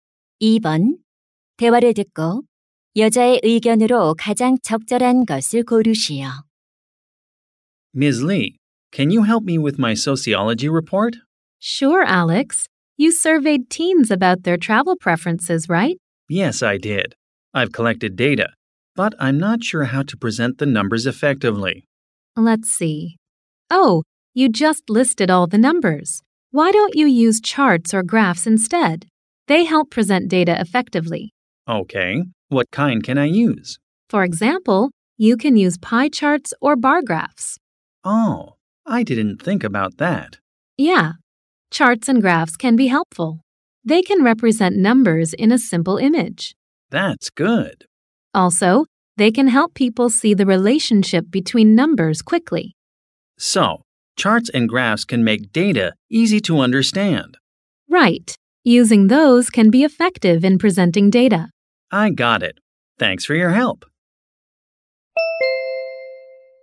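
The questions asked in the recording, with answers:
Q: 대화를 듣고 여자의 의견으로 가장 적절한 것을 고르시오.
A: 차트나 그래프를 사용하면 자료를 효과적으로 제시할 수 있다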